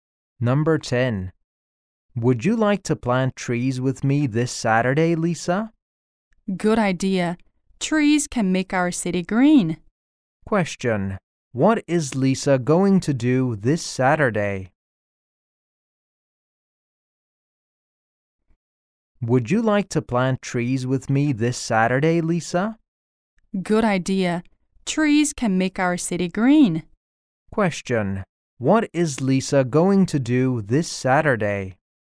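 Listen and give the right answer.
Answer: Plant trees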